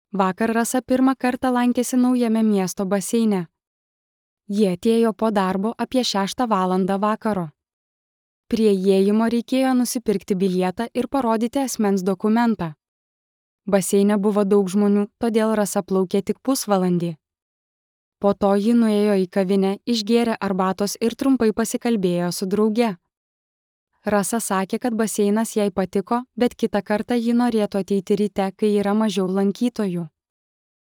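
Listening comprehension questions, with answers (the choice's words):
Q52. Kada Rasa lankėsi baseine?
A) Ryte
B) Po darbo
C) Per pietus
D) Savaitgalį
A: Po darbo

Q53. Kodėl Rasa plaukė tik pusvalandį?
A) Nes buvo daug žmonių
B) Nes baseinas buvo uždarytas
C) Nes ji neturėjo dokumento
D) Nes skubėjo į darbą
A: Nes buvo daug žmonių

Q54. Kada Rasa norėtų ateiti kitą kartą?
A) Ryte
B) Vakare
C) Per pietus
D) Sekmadienį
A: Ryte

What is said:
Vakar Rasa pirmą kartą lankėsi naujame miesto baseine. Ji atėjo po darbo, apie šeštą valandą vakaro. Prie įėjimo reikėjo nusipirkti bilietą ir parodyti asmens dokumentą. Baseine buvo daug žmonių, todėl Rasa plaukė tik pusvalandį. Po to ji nuėjo į kavinę, išgėrė arbatos ir trumpai pasikalbėjo su drauge. Rasa sakė, kad baseinas jai patiko, bet kitą kartą ji norėtų ateiti ryte, kai yra mažiau lankytojų.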